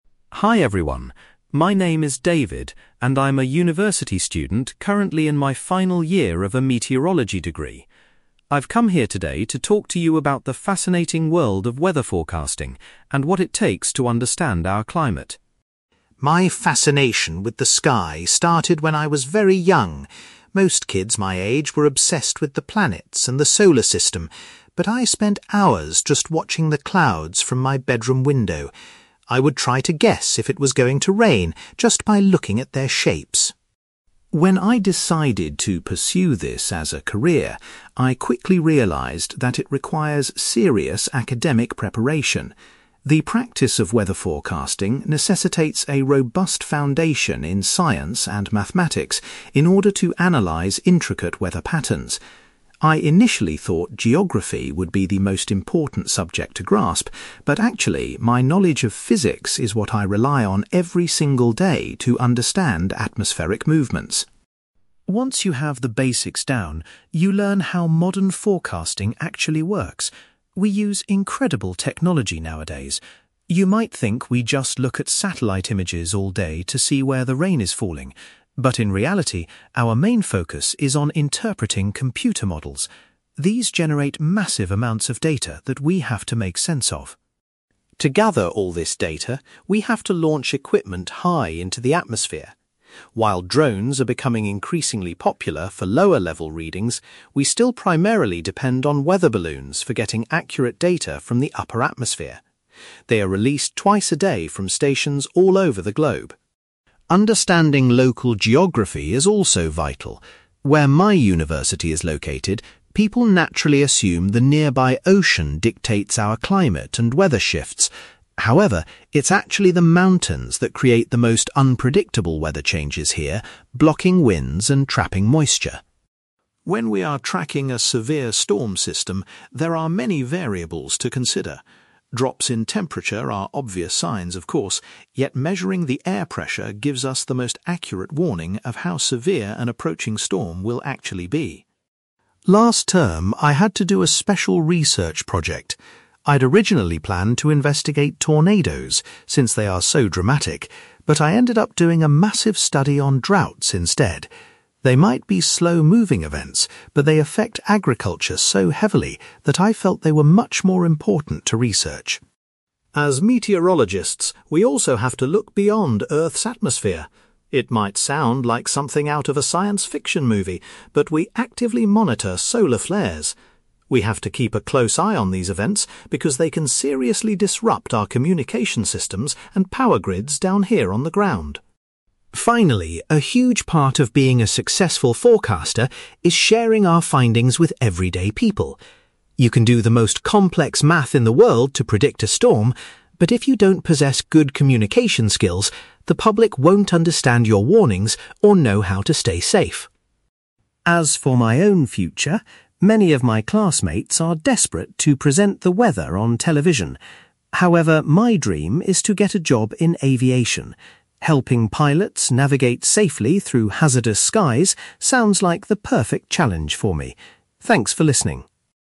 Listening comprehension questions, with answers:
You will hear a university student called David giving a presentation about his studies in meteorology. For questions 9-18, complete the sentences with a word or short phrase.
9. As a child, David was particularly fascinated by observing (9)........................... rather than space.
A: clouds

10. David was surprised to find that a strong background in (10)........................... was more useful than geography.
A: physics

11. David explains that meteorologists spend most of their time looking at (11)........................... rather than satellite images.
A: computer models

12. David mentions that (12)........................... are still the most reliable tool for collecting high-altitude data.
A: weather balloons

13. According to David, the local (13)........................... are the main cause of sudden changes in the weather.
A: mountains

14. David says that checking the (14)........................... is the best way to determine a storm's severity.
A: air pressure

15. For his recent university project, David chose to investigate (15)........................... instead of tornadoes.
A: droughts

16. David warns that (16)........................... have the potential to cause problems for communications and power on Earth.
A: solar flares

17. David believes that having excellent (17)........................... is essential for warning the public effectively.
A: communication skills

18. In the future, David hopes to find employment in the field of (18)........................... .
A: aviation

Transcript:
David: Hi everyone. My name is David, and I'm a university student currently in my final year of a meteorology degree. I've come here today to talk to you about the fascinating world of weather forecasting, and what it takes to understand our climate.
My fascination with the sky started when I was very young. Most kids my age were obsessed with the planets and the solar system, but I spent hours just watching the clouds from my bedroom window. I would try to guess if it was going to rain just by looking at their shapes.
When I decided to pursue this as a career, I quickly realised that it requires serious academic preparation. The practice of weather forecasting necessitates a robust foundation in science and mathematics in order to analyze intricate weather patterns. I initially thought geography would be the most important subject to grasp, but actually, my knowledge of physics is what I rely on every single day to understand atmospheric movements.
Once you have the basics down, you learn how modern forecasting actually works. We use incredible technology nowadays. You might think we just look at satellite images all day to see where the rain is falling, but in reality, our main focus is on interpreting computer models. These generate massive amounts of data that we have to make sense of.
To gather all this data, we have to launch equipment high into the atmosphere. While drones are becoming increasingly popular for lower-level readings, we still primarily depend on weather balloons for getting accurate data from the upper atmosphere. They are released twice a day from stations all over the globe.
Understanding local geography is also vital. Where my university is located, people naturally assume the nearby ocean dictates our climate and weather shifts. However, it's actually the mountains that create the most unpredictable weather changes here, blocking winds and trapping moisture.
When we are tracking a severe storm system, there are many variables to consider. Drops in temperature are obvious signs, of course, yet measuring the air pressure gives us the most accurate warning of how severe an approaching storm will actually be.
Last term, I had to do a special research project. I'd originally planned to investigate tornadoes, since they are so dramatic, but I ended up doing a massive study on droughts instead. They might be slow-moving events, but they affect agriculture so heavily that I felt they were much more important to research.
As meteorologists, we also have to look beyond Earth's atmosphere. It might sound like something out of a science fiction movie, but we actively monitor solar flares. We have to keep a close eye on these events because they can seriously disrupt our communication systems and power grids down here on the ground.
Finally, a huge part of being a successful forecaster is sharing our findings with everyday people. You can do the most complex math in the world to predict a storm, but if you don't possess good communication skills, the public won't understand your warnings or know how to stay safe.
As for my own future, many of my classmates are desperate to present the weather on television. However, my dream is to get a job in aviation. Helping pilots navigate safely through hazardous skies sounds like the perfect challenge for me. Thanks for listening!

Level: B2